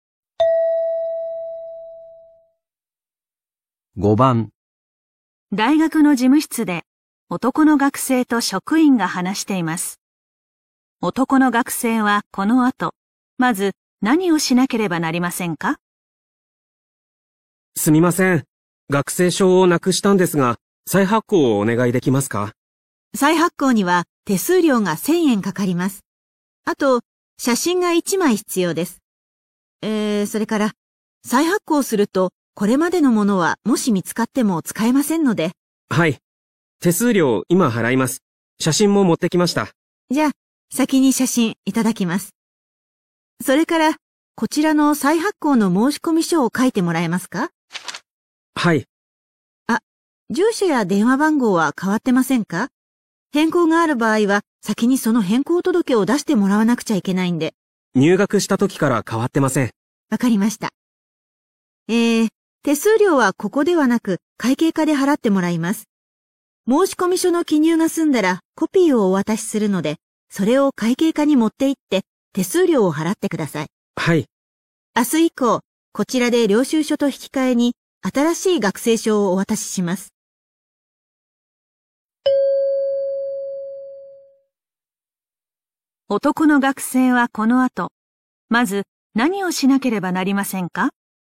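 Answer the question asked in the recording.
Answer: 再発行の申込書を書く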